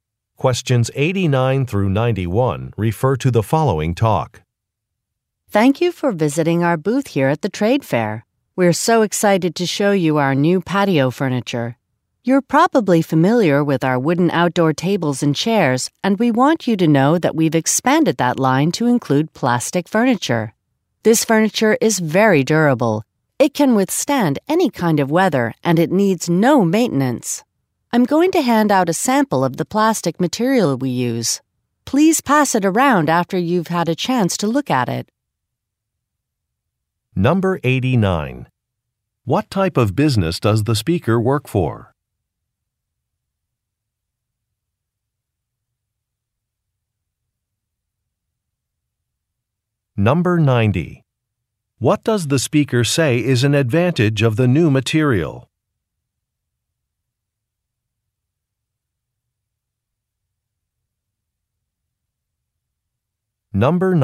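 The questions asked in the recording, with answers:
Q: What type of business does the speaker work for?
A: A furniture company

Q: What does the speaker say is an advantage of the new material?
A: It is durable and weather-resistant, needing no maintenance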